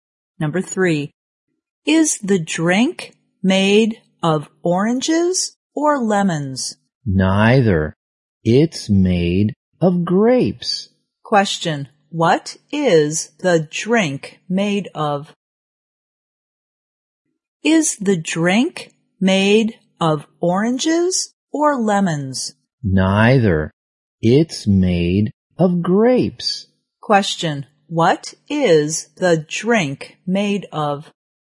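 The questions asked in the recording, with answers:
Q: What is the drink made of?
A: Grapes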